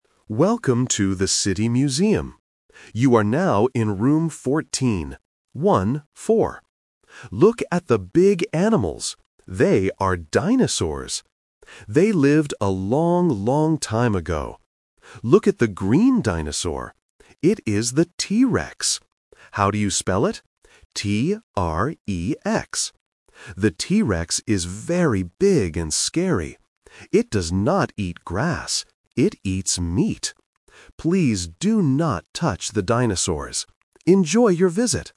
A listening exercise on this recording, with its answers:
Listen to the museum audio guide. Choose the correct answer (A, B, or C).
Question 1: What room is this?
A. Room 4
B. Room 14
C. Room 40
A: B. Room 14

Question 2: What is the name of the green dinosaur?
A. T-R-E-X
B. T-R-A-C-K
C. T-R-E-E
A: A. T-R-E-X

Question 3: What does the T-Rex eat?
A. Grass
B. Fish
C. Meat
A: C. Meat

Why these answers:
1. The audio guide says, "You are now in Room fourteen. One, four." Option C (Room 40) is the trap because "forty" sounds very similar to "fourteen". Option A (Room 4) is just a distractor.
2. The guide spells the name clearly: "T-R-E-X." Option B (T-R-A-C-K) and Option C (T-R-E-E) are traps because they have similar letters, but they are not the correct spelling in the audio.
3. The guide says, "It does not eat grass. It eats meat." Option A (Grass) is the trap because it is mentioned in the audio, but the guide says the T-Rex does not eat it. Option B (Fish) is not mentioned.

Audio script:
Audio Guide: Welcome to the City Museum. You are now in Room fourteen. Look at the big animals. They are dinosaurs. They lived a long, long time ago. Look at the green dinosaur. It is the T-Rex. How do you spell it? The T-Rex is very big and scary. It does not eat grass. It eats meat. Please do not touch the dinosaurs. Enjoy your visit.

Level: A1

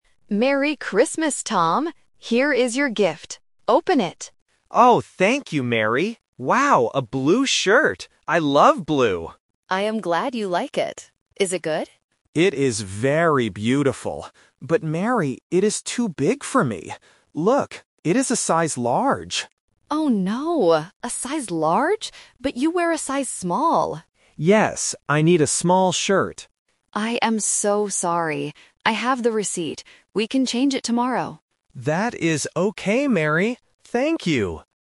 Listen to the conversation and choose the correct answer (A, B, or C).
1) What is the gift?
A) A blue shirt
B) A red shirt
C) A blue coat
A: A) A blue shirt

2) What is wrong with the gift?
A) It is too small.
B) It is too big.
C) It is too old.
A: B) It is too big.

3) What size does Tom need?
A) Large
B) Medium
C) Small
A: C) Small

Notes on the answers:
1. Tom says, "Wow, a blue shirt! I love blue."
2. Tom clearly says, "But Mary, it is too big for me."
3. Mary says, "But you wear a size Small." Tom agrees, "Yes, I need a small shirt."

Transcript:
Mary: Merry Christmas, Tom! Here is your gift. Open it!
Tom: Oh, thank you, Mary! Wow, a blue shirt! I love blue.
Mary: I am glad you like it. Is it good?
Tom: It is very beautiful. But Mary, it is too big for me. Look, it is a size Large.
Mary: Oh no! A size Large? But you wear a size Small.
Tom: Yes, I need a small shirt.
Mary: I am so sorry. I have the receipt. We can change it tomorrow.

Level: A1

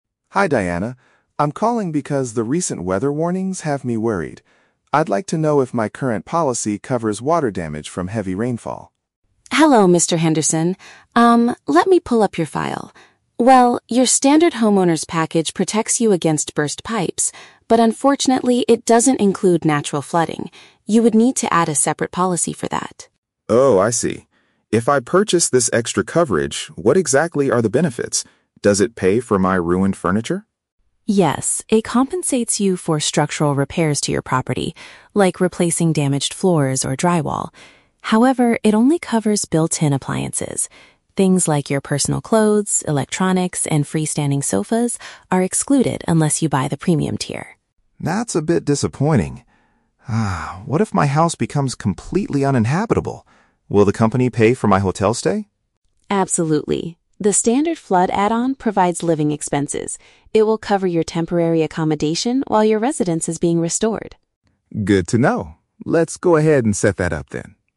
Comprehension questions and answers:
Listen to a conversation between a homeowner and an insurance agent, and choose the correct answer (A, B, or C) for each question.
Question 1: What is the limitation of the man's current insurance package?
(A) It fails to protect the house from natural weather disasters.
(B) It requires him to pay for broken indoor pipes himself.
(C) It is currently expired and needs an immediate renewal.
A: (A) It fails to protect the house from natural weather disasters.

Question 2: Under the standard flood add-on, what will NOT be compensated?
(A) Physical repairs to the building's walls and floors.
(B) Movable household objects and electronic gadgets.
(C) Damage to the trees and plants in the garden.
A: (B) Movable household objects and electronic gadgets.

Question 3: What benefit does the policy provide if the house becomes uninhabitable?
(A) It gives the homeowner a free upgrade to the premium tier.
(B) It covers the cost of hiring professional moving companies.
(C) It pays for the expenses of temporary lodging elsewhere.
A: (C) It pays for the expenses of temporary lodging elsewhere.

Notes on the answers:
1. Diana explains that the standard package "doesn't include natural flooding". "Fails to protect the house from natural weather disasters" is a paraphrase of this limitation.
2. Diana states that things like "electronics, and freestanding sofas are excluded". "Movable household objects and electronic gadgets" is a paraphrase for these excluded items.
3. Mr. Henderson asks if they will pay for a "hotel stay", and Diana confirms it covers "temporary accommodation". "Temporary lodging" is a direct synonym for these phrases.

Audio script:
Mr. Henderson: Hi Diana. I'm calling because the recent weather warnings have me worried. I'd like to know if my current policy covers water damage from heavy rainfall.
Diana: Hello, Mr. Henderson. Um, let me pull up your file. Well, your standard homeowner's package protects you against burst pipes, but unfortunately, it doesn't include natural flooding. You would need to add a separate policy for that.
Mr. Henderson: Oh, I see. If I purchase this extra coverage, what exactly are the benefits? Does it pay for my ruined furniture?
Diana: Yes, it compensates you for structural repairs to your property, like replacing damaged floors or drywall. However, it only covers built-in appliances. Things like your personal clothes, electronics, and freestanding sofas are excluded unless you buy the premium tier.
Mr. Henderson: That's a bit disappointing. Ah, what if my house becomes completely uninhabitable? Will the company pay for my hotel stay?
Diana: Absolutely. The standard flood add-on provides living expenses. It will cover your temporary accommodation while your residence is being restored.

